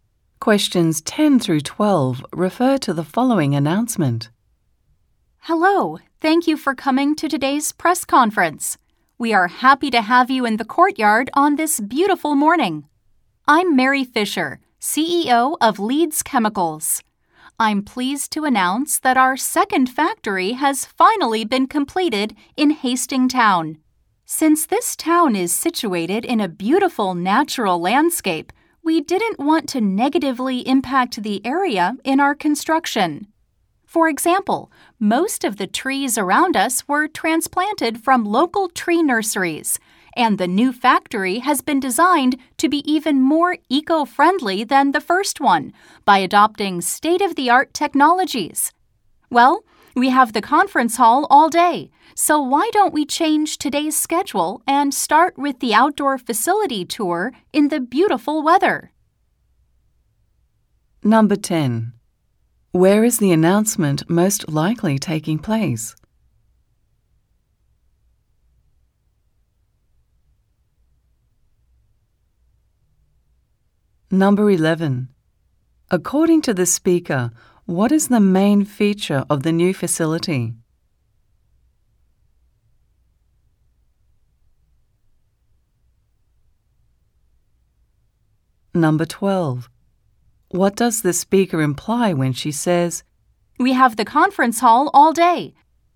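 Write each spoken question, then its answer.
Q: Where is the announcement most likely taking place?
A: In the courtyard of the new factory

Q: According to the speaker, what is the main feature of the new facility?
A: It is eco-friendly, using state-of-the-art technologies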